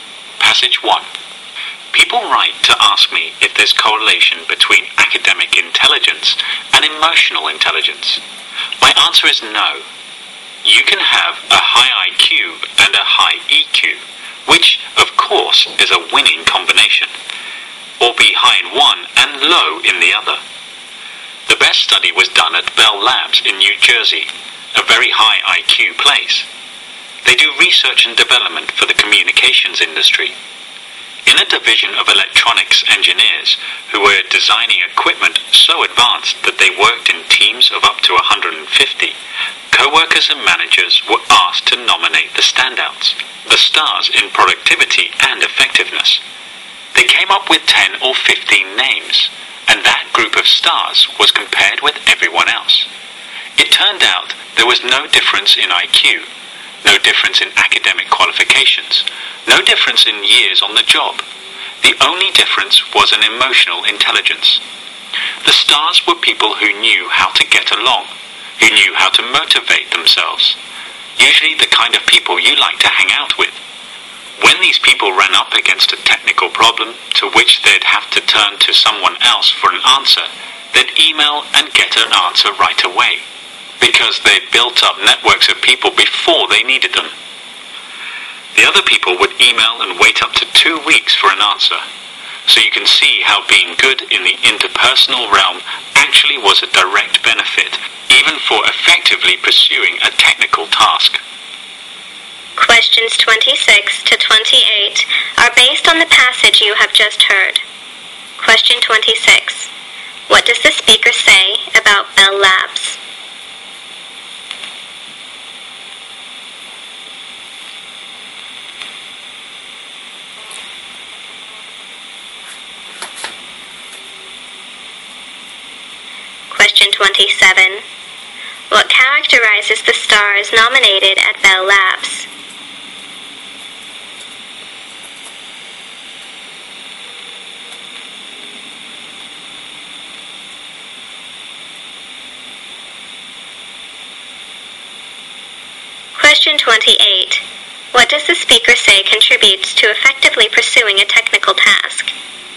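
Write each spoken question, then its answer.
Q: What does the speaker say about Bell Labs?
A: It is a very high IQ place that does research and development for the communications industry.

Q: What characterizes the stars nominated at Bell Labs?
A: Their emotional intelligence; they knew how to get along and motivate themselves.

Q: What does the speaker say contributes to effectively pursuing a technical task?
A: Being good in the interpersonal realm, such as building networks of people.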